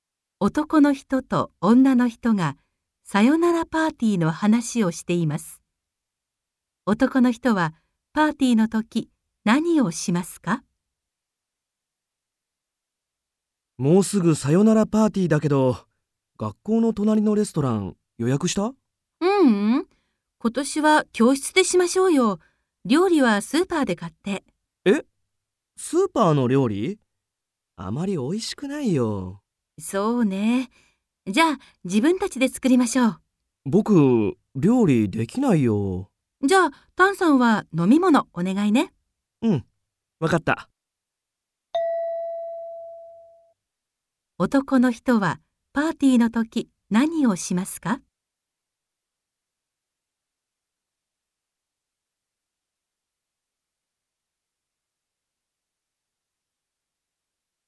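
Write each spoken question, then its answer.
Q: 男の人はパーティーの時何をしますか?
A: 飲み物を用意する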